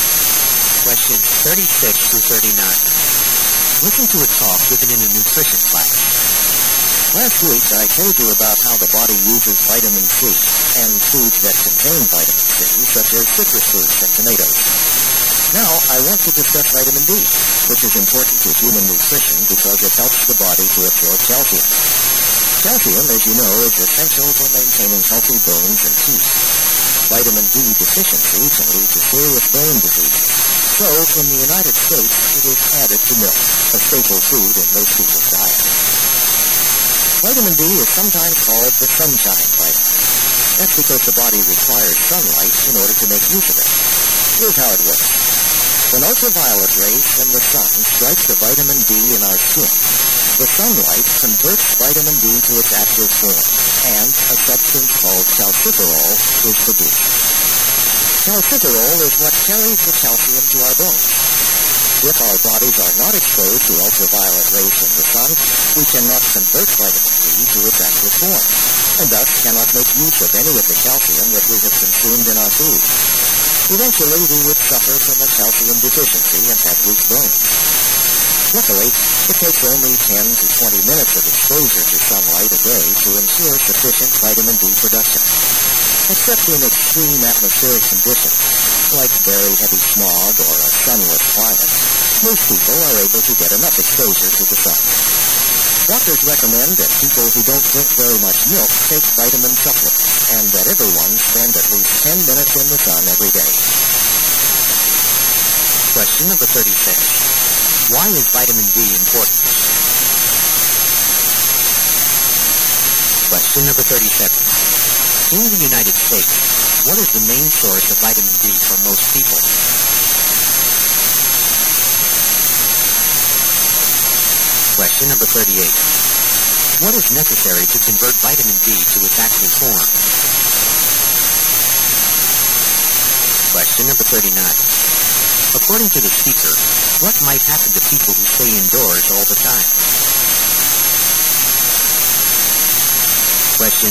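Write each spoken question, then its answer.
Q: Why is vitamin D important?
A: It helps the body absorb calcium

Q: In the United States, what is the main source of vitamin D for most people?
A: Milk

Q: What is necessary to convert vitamin D to its active form?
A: Sunlight (ultraviolet rays)

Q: According to the speaker, what might happen to people who stay indoors all the time?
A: They could get a calcium deficiency and weak bones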